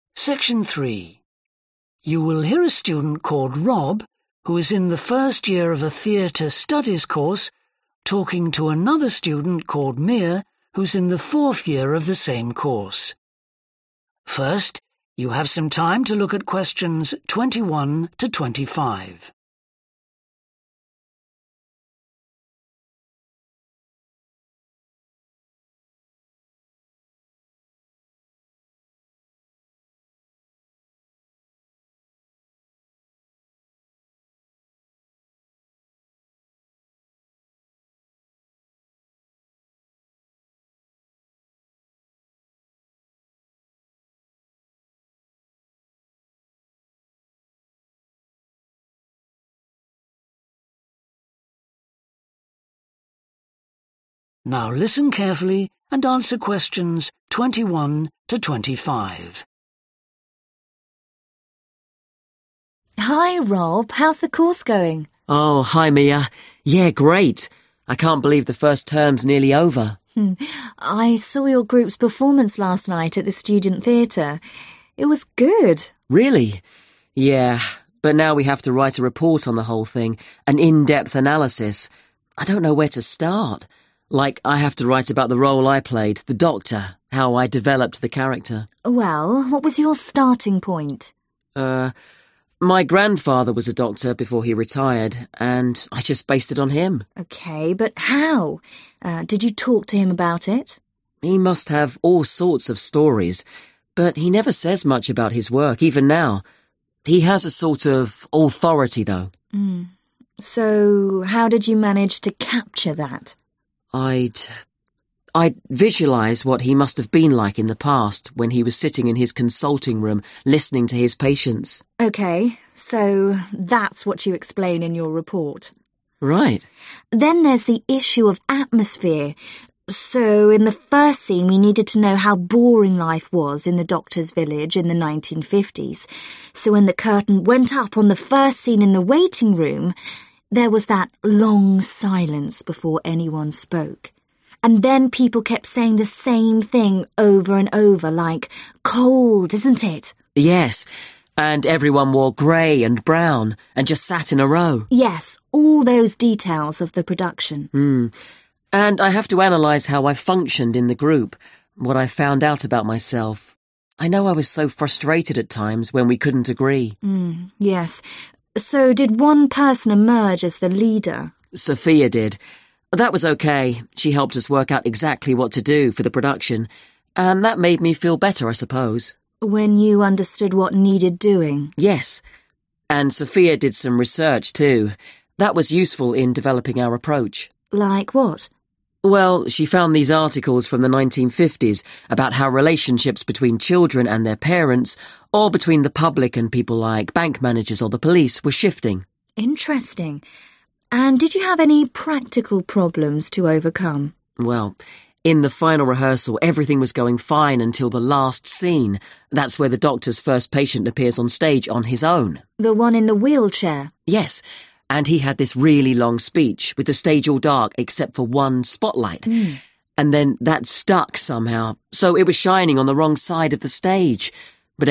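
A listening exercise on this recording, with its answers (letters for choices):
Choose the correct letter, A, B or C.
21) What helped Rob to prepare to play the character of a doctor?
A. the stories his grandfather told him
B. the times when he watched his grandfather working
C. the way he imagined his grandfather at work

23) What has Rob learned about himself through working in a group?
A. He likes to have clear guidelines.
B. He copes well with stress.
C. He thinks he is a good leader.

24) To support the production, research material was used which described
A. political developments.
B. changing social attitudes.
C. economic transformations.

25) What problem did the students overcome in the final rehearsal?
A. one person forgetting their words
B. an equipment failure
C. the injury of one character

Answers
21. C
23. A
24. B
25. B

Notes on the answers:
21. I'd visualize what he must have been like in the past, when he was sitting in his consulting room listening to his patients. 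(Tôi hình dung ra cách mà ông của tôi đã làm trong quá khứ khi mà ông ấy lắng nghe bệnh nhân ở phòng tư vấn của mình..)
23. Sophia did. That was OK – she helped us work out exactly what to do, for the production. And that made me feel better, I suppose. (cô ấy đã giúp chúng tôi tìm ra chính xác những gì cần làm cho quá trình sản xuất. Và điều đó khiến tôi cảm thấy tốt hơn, tôi cho là vậy.)
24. Well, she found these articles from the 1950s about how relationships between children and their parents, or between the public and people like bank managers or th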